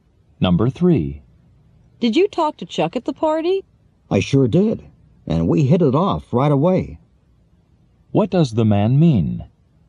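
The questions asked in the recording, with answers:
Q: What does the man mean?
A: He and Chuck liked each other right away.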